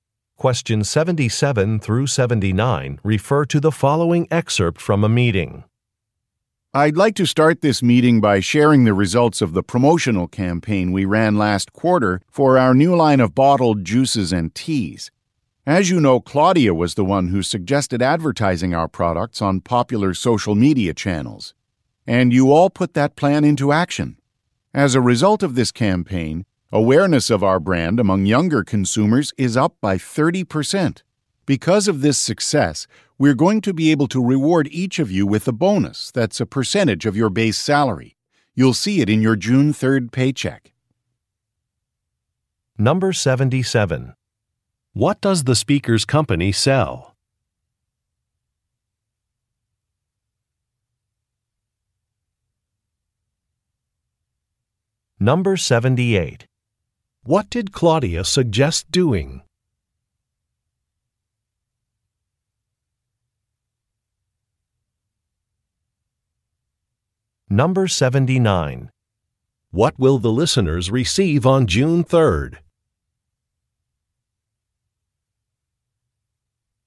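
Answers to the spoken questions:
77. Bottled juices and teas
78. Advertising on social media
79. A bonus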